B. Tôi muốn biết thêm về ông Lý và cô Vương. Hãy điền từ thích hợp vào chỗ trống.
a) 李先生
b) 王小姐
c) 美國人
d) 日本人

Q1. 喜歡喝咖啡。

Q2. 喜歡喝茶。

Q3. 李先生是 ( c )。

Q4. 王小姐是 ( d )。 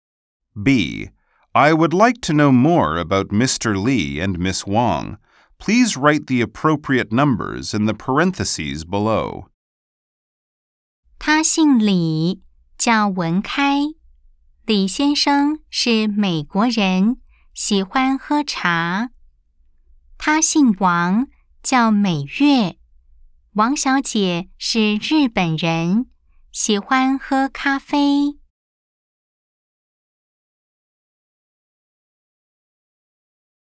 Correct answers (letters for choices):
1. b
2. a
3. c
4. d